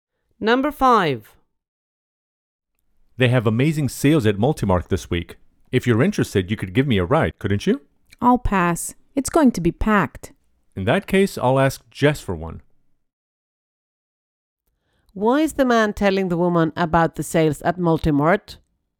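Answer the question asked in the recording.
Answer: He wants her to give him a ride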